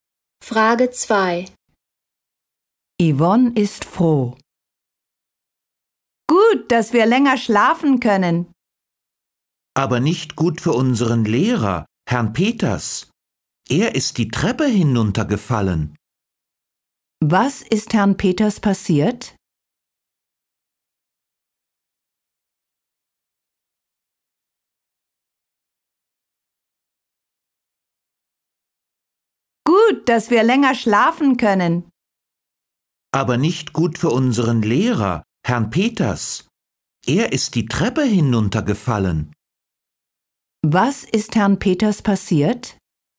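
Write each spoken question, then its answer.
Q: Was ist Herrn Peters passiert?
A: Er ist die Treppe hinuntergefallen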